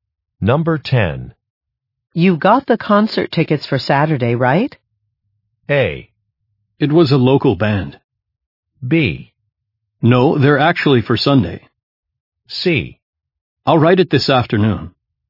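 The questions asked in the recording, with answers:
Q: You got the concert tickets for Saturday, right?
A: B: No, they're actually for Sunday.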